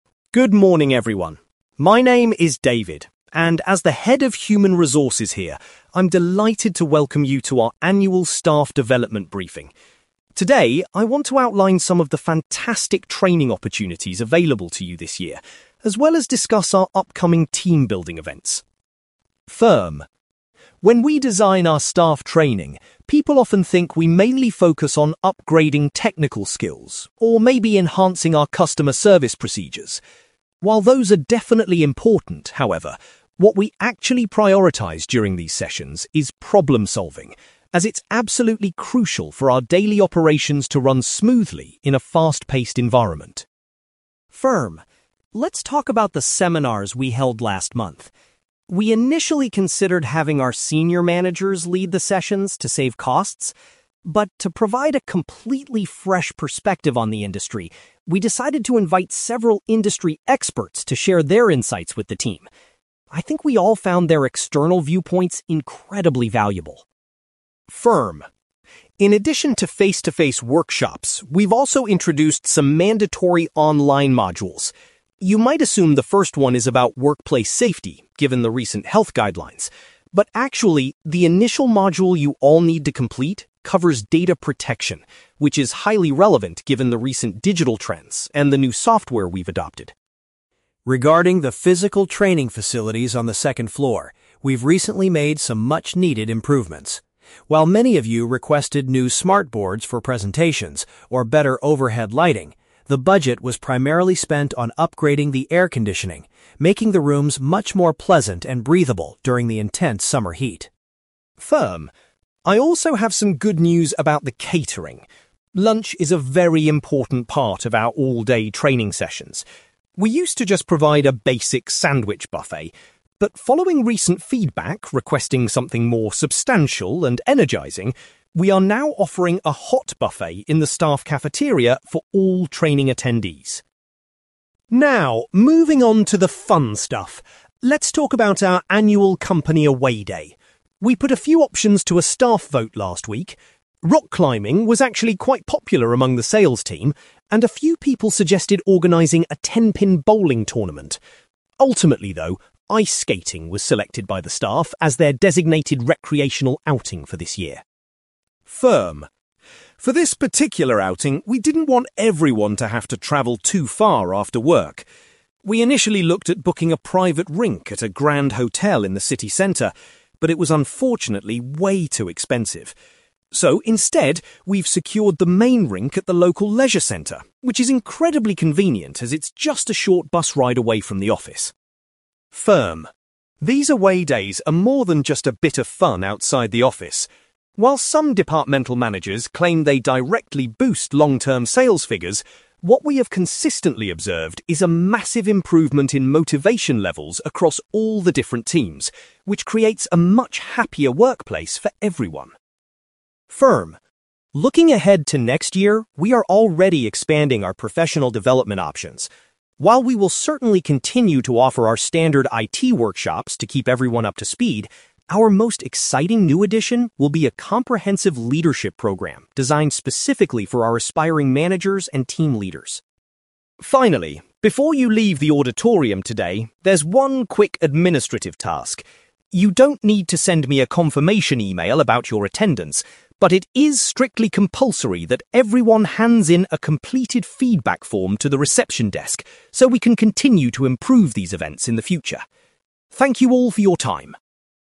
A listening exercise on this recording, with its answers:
You will hear a man called David giving a presentation to employees about staff training and development. For questions 9-18, complete the sentences with a word or short phrase.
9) David states that developing (9)........................... is the primary focus of the company's training sessions.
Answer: problem solving

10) Instead of using internal staff, the company brought in (10)........................... to run the recent seminar.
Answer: industry experts

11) The very first online training module that employees must finish is focused on (11)........................... .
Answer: data protection

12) David explains that the company invested money in improving the (12)........................... in the training rooms.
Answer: air conditioning

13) Employees attending full-day training will now be provided with a (13)........................... for their midday meal.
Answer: hot buffet

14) Despite other suggestions, the team officially chose (14)........................... for their upcoming recreational outing.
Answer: ice-skating

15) The upcoming team-building activity will be held at a nearby (15)........................... .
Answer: leisure centre

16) David notes that these social events are highly effective at raising (16)........................... among the employees.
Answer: motivation levels

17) Next year, the company is thrilled to be introducing a (17)........................... for staff members.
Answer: leadership program

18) David reminds all employees to submit a (18)........................... before finishing their session.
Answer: feedback form

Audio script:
David: Good morning, everyone. My name is David, and as the head of Human Resources here, I'm delighted to welcome you to our annual staff development briefing. Today, I want to outline some of the fantastic training opportunities available to you this year, as well as discuss our upcoming team-building events.
When we design our staff training, people often think we mainly focus on upgrading technical skills, or maybe enhancing our customer service procedures. While those are definitely important, however, what we actually prioritise during these sessions is problem solving, as it's absolutely crucial for our daily operations to run smoothly in a fast-paced environment.
Let's talk about the seminars we held last month. We initially considered having our senior managers lead the sessions to save costs. But to provide a completely fresh perspective on the industry, we decided to invite several industry experts to share their insights with the team. I think we all found their external viewpoints incredibly valuable.
In addition to face-to-face workshops, we've also introduced some mandatory online modules. You might assume the first one is about workplace safety, given the recent health guidelines. But actually, the initial module you all need to complete covers data protection, which is highly relevant given the recent digital trends and the new software we've adopted.
Regarding the physical training facilities on the second floor, we've recently made some much-needed improvements. While many of you requested new smart boards for presentations, or better overhead lighting, the budget was primarily spent on upgrading the air conditioning, making the rooms much more pleasant and breathable during the intense summer heat.
I also have some good news about the catering. Lunch is a very important part of our all-day training sessions. We used to just provide a basic sandwich buffet, but following recent feedback requesting something more substantial and energising, we are now offering a hot buffet in the staff cafeteria for all training attendees.
Now, moving on to the fun stuff! Let's talk about our annual company away day. We put a few options to a staff vote last week. Rock climbing was actually quite popular among the sales team, and a few people suggested organising a ten-pin bowling tournament. Ultimately, though, ice-skating was selected by the staff as their designated recreational outing for this year.
For this particular outing, we didn't want everyone to have to travel too far after work. We initially looked at booking a private rink at a grand hotel in the city centre, but it was unfortunately way too expensive. So, instead, we've secured the main rink at the local leisure centre, which is incredibly convenient as it's just a short bus ride away from the office.
These away days are more than just a bit of fun outside the office. While some departmental managers claim they directly boost long-term sales figures, what we have consistently observed is a massive improvement in motivation levels across all the different teams, which creates a much happier workplace for everyone.
Looking ahead to next year, we are already expanding our professional development options. While we will certainly continue to offer our standard IT workshops to keep everyone up to speed, our most exciting new addition will be a comprehensive leadership program designed specifically for our aspiring managers and team leaders.
Finally, before you leave the auditorium today, there's one quick administrative task. You don't need to send me a confirmation email about your attendance, but it is strictly compulsory that everyone hands in a completed feedback form to the reception desk, so we can continue to improve these events in the future. Thank you all for your time!

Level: B2